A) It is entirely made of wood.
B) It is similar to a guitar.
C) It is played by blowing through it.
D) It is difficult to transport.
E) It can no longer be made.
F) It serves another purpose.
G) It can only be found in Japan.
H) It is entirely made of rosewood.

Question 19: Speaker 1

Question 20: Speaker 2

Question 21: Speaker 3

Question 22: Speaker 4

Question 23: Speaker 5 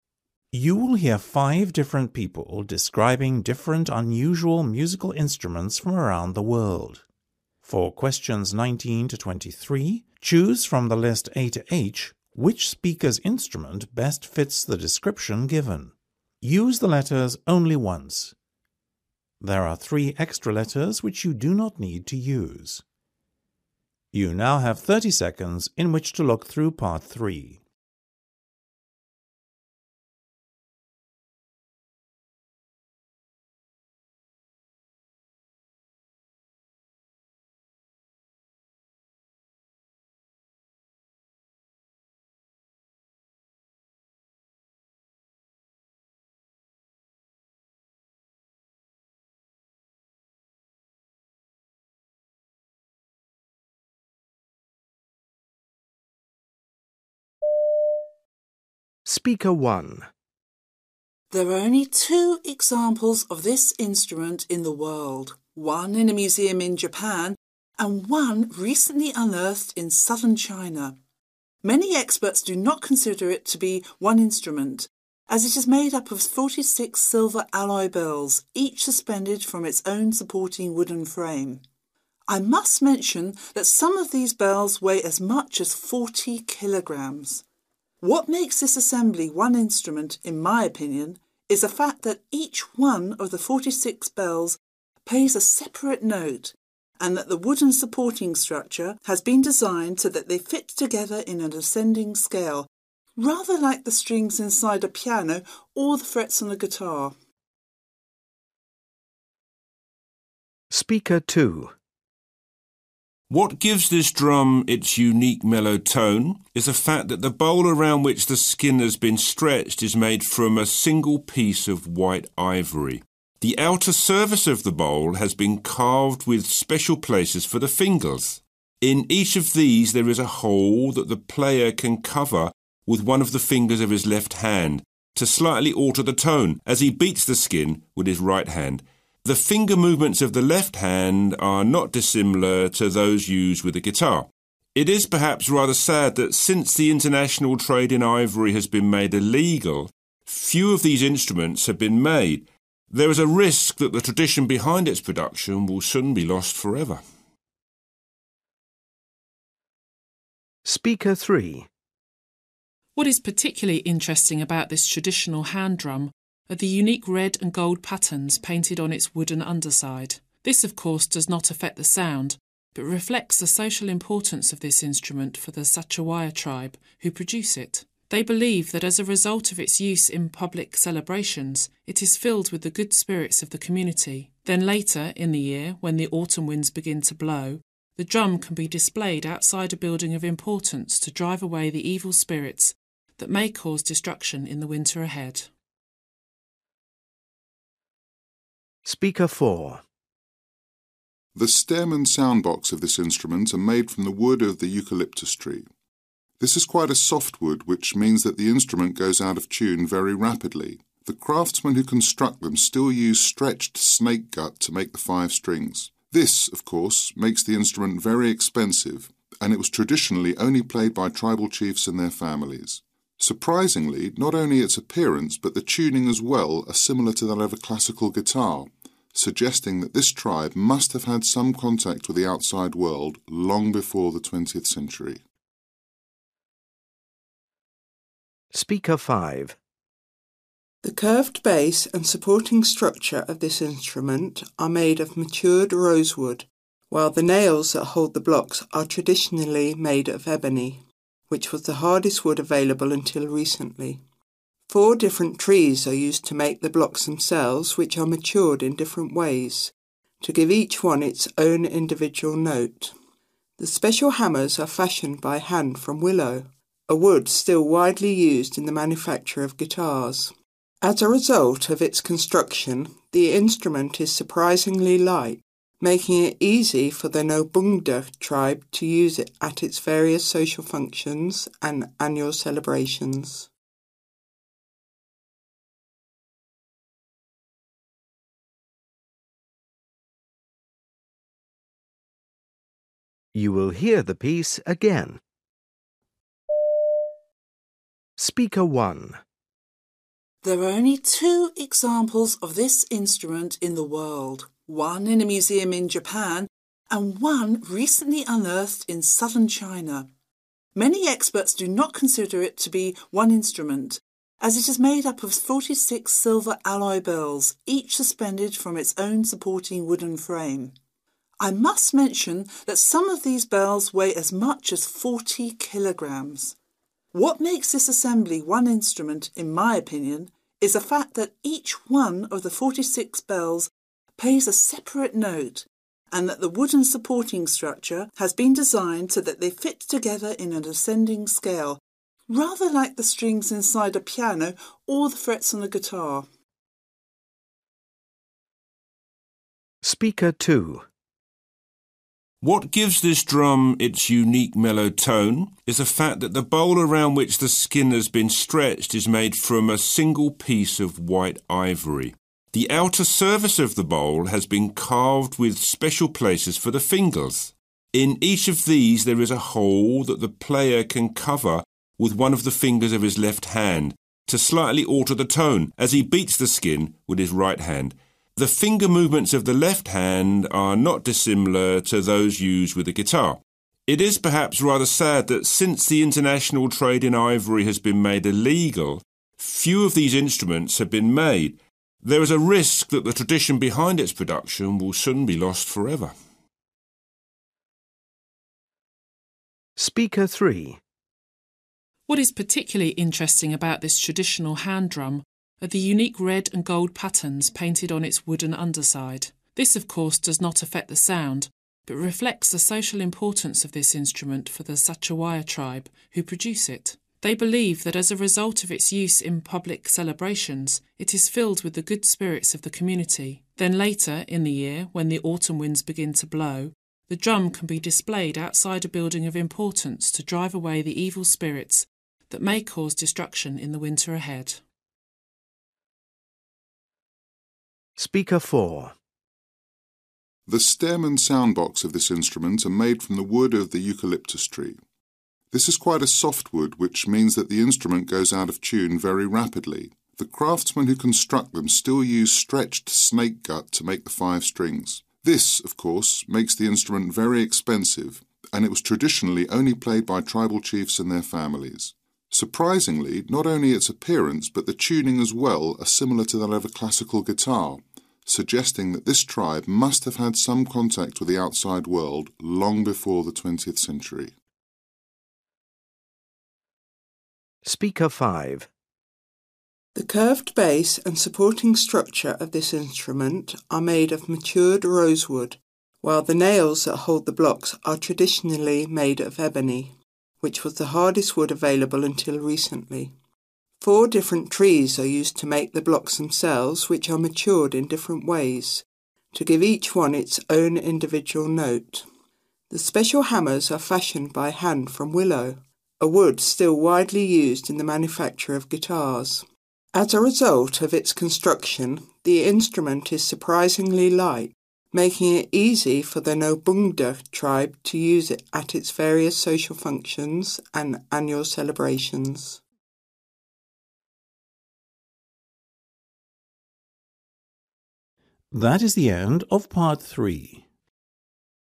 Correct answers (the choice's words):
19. It is difficult to transport.
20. It can no longer be made.
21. It serves another purpose.
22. It is similar to a guitar.
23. It is entirely made of wood.

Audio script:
Listening Part 3
You will hear five different people describing different unusual musical instruments from around the world. For questions 19-23, choose from the list A-H which speaker's instrument best fits the description given. Use the letters only once. There are three extra letters which you do not need to use.
A It is entirely made of wood.
B It is similar to a guitar.
G It can only be found in Japan.
H It is entirely made of rosewood.
19 Speaker 1
20 Speaker 2
21 Speaker 3
22 Speaker 4
23 Speaker 5
There are only two examples of this instrument in the world, one in a museum in Japan and one recently unearthed in southern China. Many experts do not consider it to be one instrument as it is made up of 46 silver alloy bells each suspended from its own supporting wooden frame. I must mention that some of these bells weigh as much as 40 kilograms. What makes this assembly one instrument, in my opinion, is the fact that each one of the forty six bells plays a separate note and that the wooden supporting structure has been designed so that they fit together in an ascending scale rather like the strings inside a piano or the frets on a guitar.
What gives this drum its unique mellow tone is the fact that the bowl around which the skin has been stretched is made from a single piece of white ivory. The outer surface of the bowl has been carved with special places for the fingers. In each of these there is a hole that the player can cover with one of the fingers of his left hand to slightly alter the tone as he beats the skin with his right hand. The finger movements of the left hand are not dissimilar to those used with a guitar. It is, perhaps, rather sad that since international trade in ivory has been made illegal, few of these instruments have been made. There is a risk that the tradition behind its production will soon be lost forever.
What is particularly interesting about this traditional hand drum are the unique red and gold patterns painted on its wooden underside. This, of course, does not affect the sound but reflects the social importance of this instrument for the Sachawaya tribe who produce it. They believe that as a result of its use in pubic celebrations, it is filled with the good spirits of the community. Then, later in the year, when the autumn winds begin to blow, the drum can be displayed outside a building of importance to drive away the evil spirits that may cause destruction in the winter ahead.
The stem and sound-box of this instrument are made from the wood of the eucalyptus tree. This is quite a soft wood which means that the instrument goes out of tune very rapidly. The craftsmen who construct them still use stretched snake-gut to make the five strings. This, of course, makes the instrument very expensive and it was traditionally only played by tribal chiefs and their families. Surprisingly, not only its appearance but the tuning as well are similar to that of a classical guitar, suggesting that this tribe must have had some contact with the outside world long before the twentieth century.
The curved base and supporting structure of this instrument are made of matured rose-wood while the nails that hold the blocks are traditionally made of ebony, which was the hardest wood available until recently. Four different trees are used to make the blocks themselves which are matured in different ways, to give each one its own individual note. The special hammers are fashioned by hand from willow, a wood still widely used in the manufacture of guitars. As a result of its construction, the instrument is surprisingly light, making it easy for the Nabungda tribe to use it at its various social functions and annual celebrations.

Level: B2